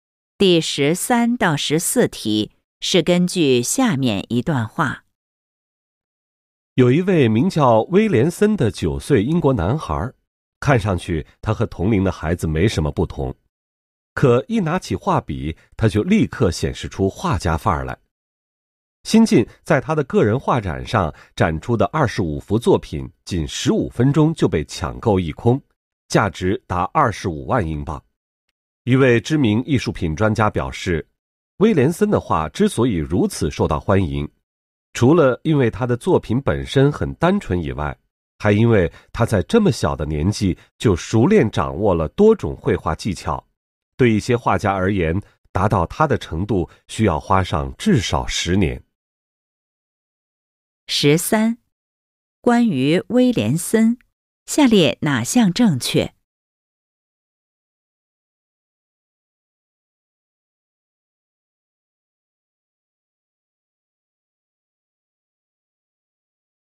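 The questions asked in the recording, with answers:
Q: 威廉森的画受欢迎的原因是什么?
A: 作品单纯,小小年纪就熟练掌握多种绘画技巧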